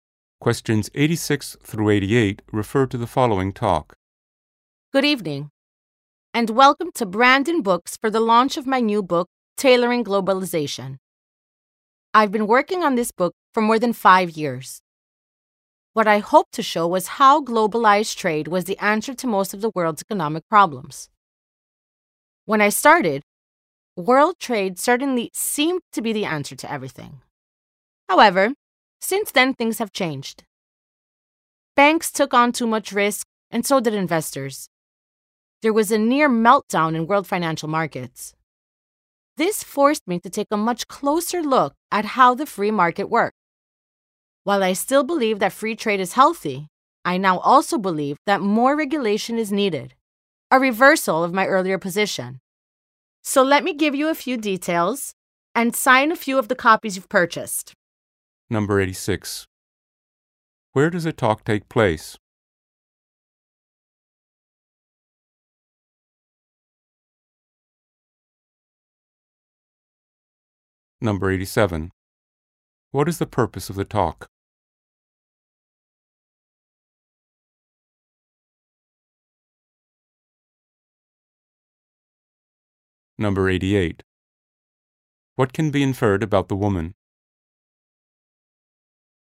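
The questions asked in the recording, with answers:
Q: Where does a talk take place?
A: At a bookstore

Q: What is the purpose of the talk?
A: To launch her new book

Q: What can be inferred about the woman?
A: She has changed her views on free trade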